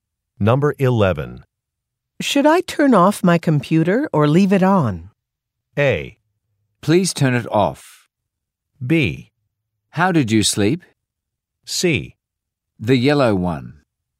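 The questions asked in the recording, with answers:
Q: Should I turn off my computer or leave it on?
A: A: Please turn it off.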